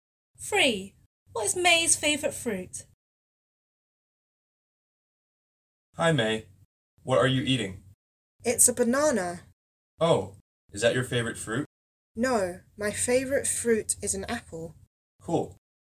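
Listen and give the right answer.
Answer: an apple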